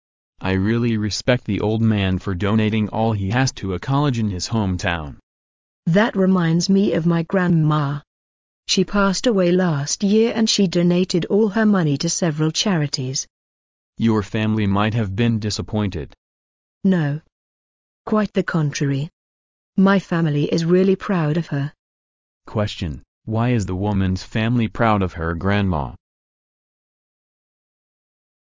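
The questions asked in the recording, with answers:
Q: why is the woman's family proud of her grandma?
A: She donated all her money to several charities

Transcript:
[听力原文] M: I really respect the old man for donating all he has to a college in his hometown. W: That reminds me of my grandma. She passed away last year and she donated all her money to several charities. M: Your family might have been disappointed. W: No, quite the contrary. My family is really proud of her. Question: Why is the woman's family proud of her grandma?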